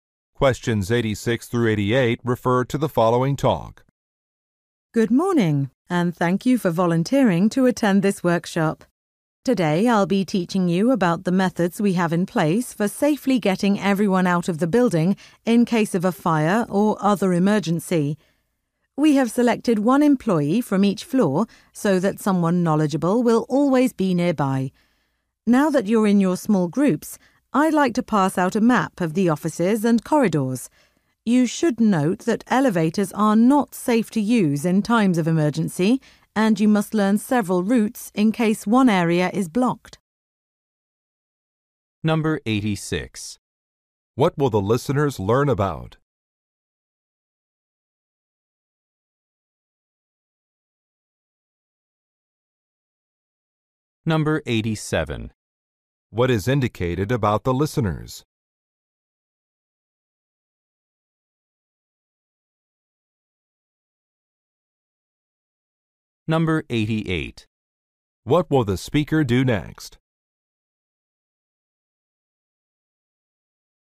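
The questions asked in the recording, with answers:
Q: What will the listeners learn about?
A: Emergency evacuation procedures

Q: What is indicated about the listeners?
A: They are volunteers, one from each floor

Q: What will the speaker do next?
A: Hand out a map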